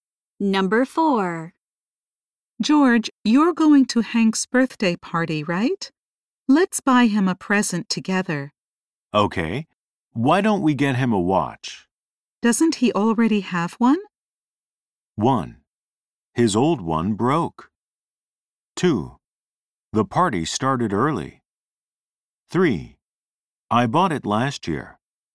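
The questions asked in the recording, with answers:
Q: Doesn't he already have one?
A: 1: His old one broke.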